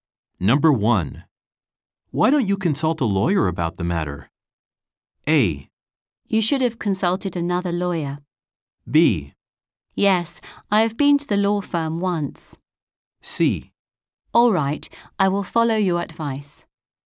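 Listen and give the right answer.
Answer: C: All right, I will follow your advice.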